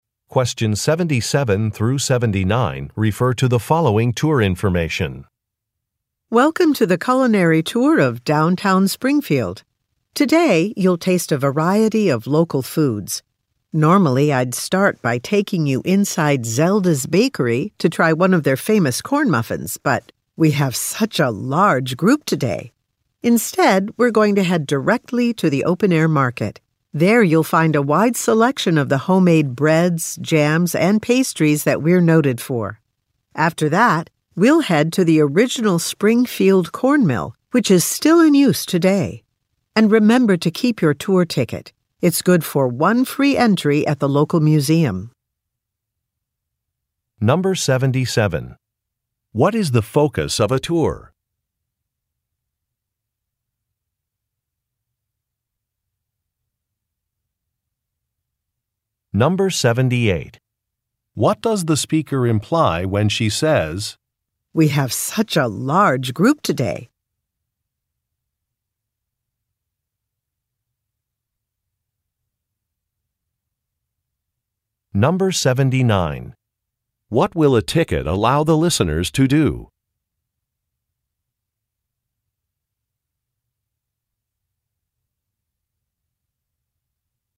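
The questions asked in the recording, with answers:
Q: What is the focus of a tour?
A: Local food

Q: What does the speaker imply when she says,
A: The group is too large to go inside the bakery

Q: What will a ticket allow the listeners to do?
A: Enter the local museum for free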